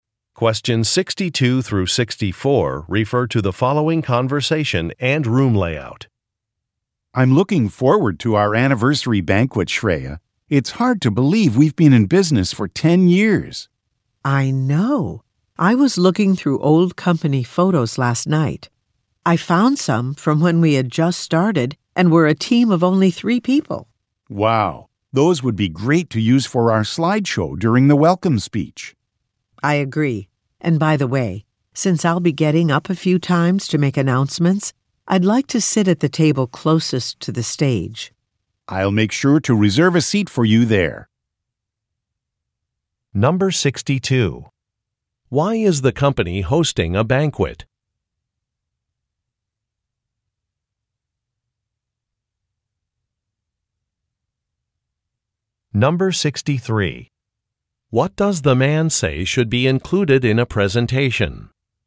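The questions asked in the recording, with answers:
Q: Why is the company hosting a banquet?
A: To celebrate its 10th anniversary in business

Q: What does the man say should be included in a presentation?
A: Old company photos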